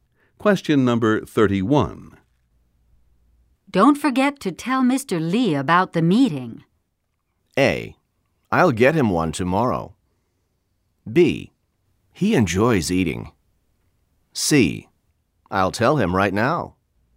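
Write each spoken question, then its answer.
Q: Don't forget to tell Mr. Lee about the meeting.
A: C: I'll tell him right now.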